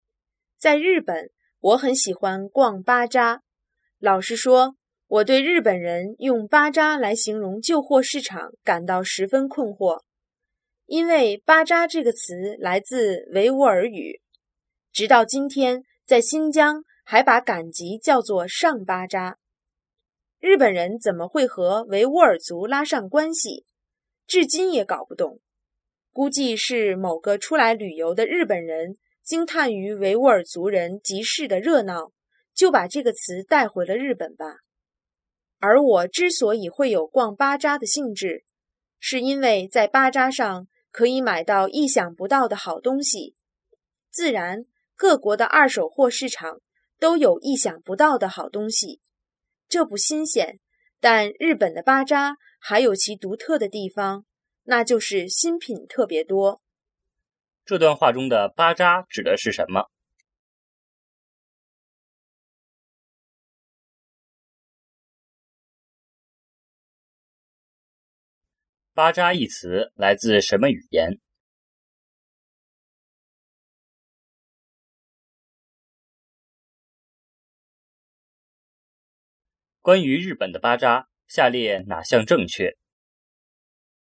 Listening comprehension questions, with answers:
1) 这段话中的"巴扎"指的是什么?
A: 二手货市场

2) "巴扎"一词来自什么语言?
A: 维吾尔语

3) 关于日本的巴扎,下列哪项正确?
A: 日本巴扎有很多"新品"

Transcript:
在日本我很喜欢逛巴扎。老实说,我对日本人用"巴扎"来形容旧货市场感到十分困惑,因为"巴扎"这个词来自维吾尔语,直到今天在新疆还把赶集叫作上巴扎。日本人怎么会和维吾尔族拉上关系,至今也搞不懂,估计是某个出来旅游的日本人惊叹于维吾尔族人集市的热闹,就把这个词带回了日本吧。而我之所以会有逛巴扎的兴致,是因为在巴扎上可以买到意想不到的好东西。自然,各国的二手货市场都有意想不到的好东西,这不新鲜,但日本的巴扎还有其独特的地方,那就是"新品"特别多。

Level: 汉语水平考试(HSK)五级